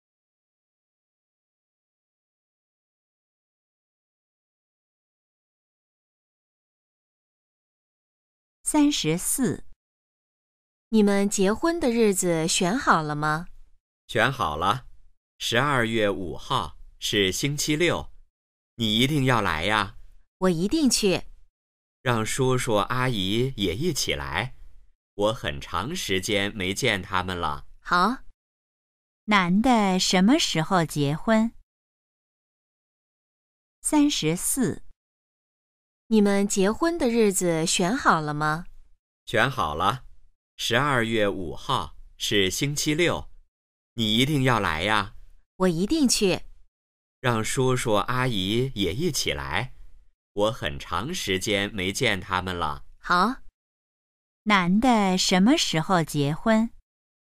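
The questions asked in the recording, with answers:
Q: 男的什么时候结婚?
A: 12月5号(星期六)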